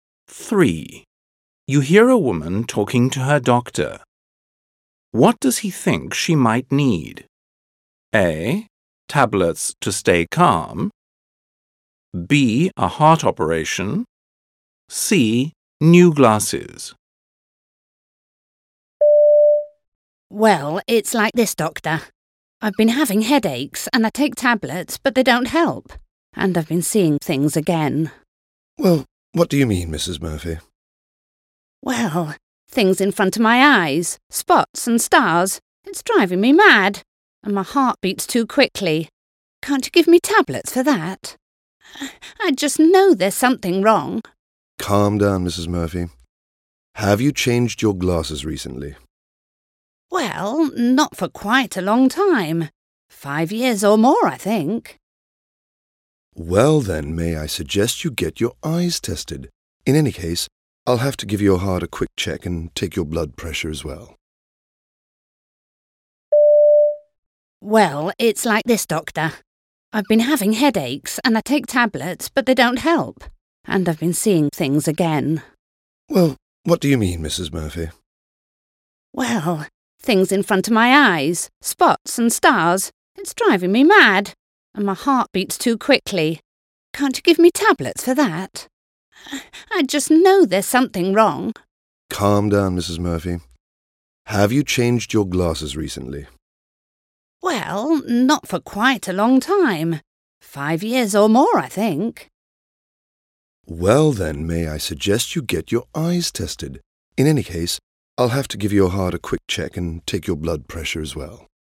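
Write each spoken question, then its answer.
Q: What does he think she might need?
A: C: New glasses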